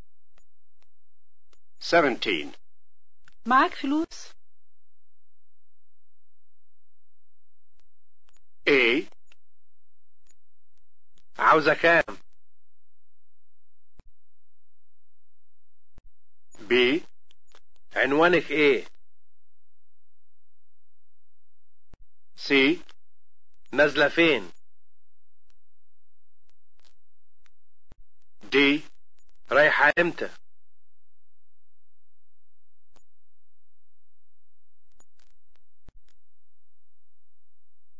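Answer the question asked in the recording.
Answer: A: عاوزة كام؟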